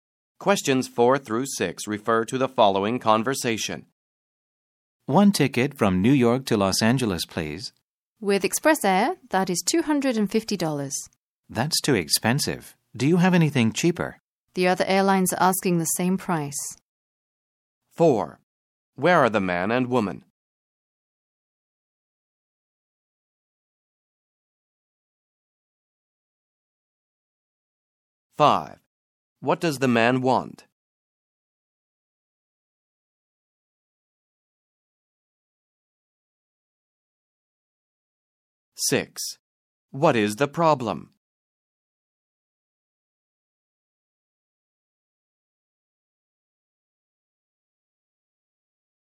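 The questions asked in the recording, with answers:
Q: What does the man want?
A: A ticket from New York to Los Angeles

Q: What is the problem?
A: The ticket is too expensive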